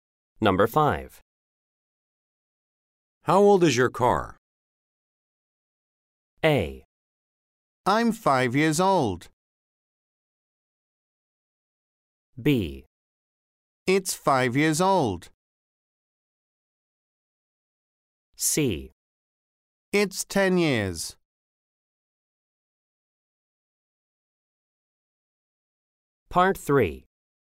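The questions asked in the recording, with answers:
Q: How old is your car?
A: B: It's 5 years old.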